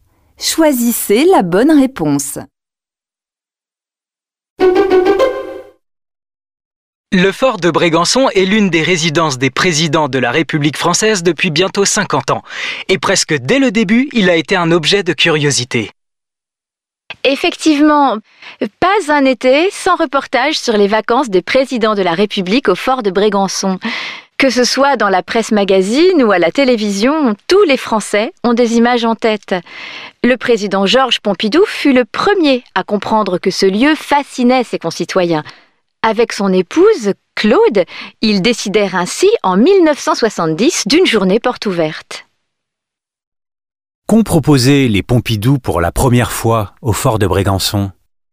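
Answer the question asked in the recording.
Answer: Une journée portes ouvertes (en 1970)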